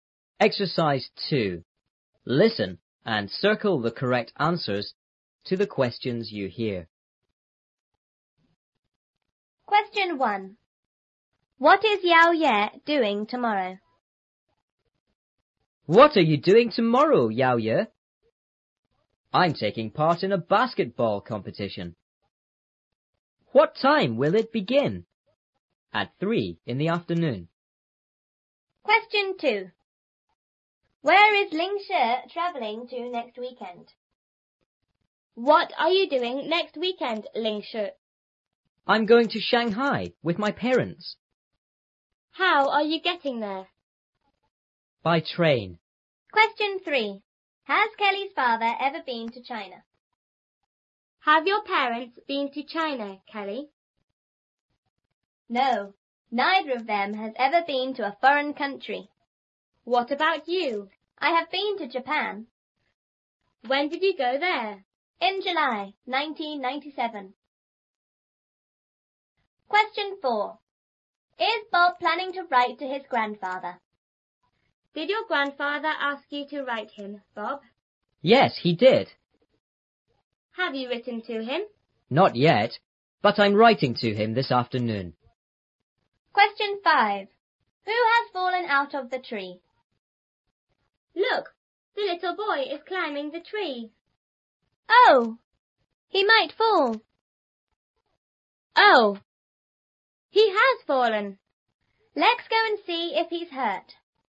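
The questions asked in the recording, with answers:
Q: What is Yao Ye doing tomorrow?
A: He's taking part in a basketball competition.

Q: Where is Ling Shi travelling to next weekend?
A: Shanghai

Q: Has Kelly's father ever been to China?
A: No, he hasn't.

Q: Is Bob planning to write to his grandfather?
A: Yes, this afternoon.

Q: Who has fallen out of the tree?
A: The little boy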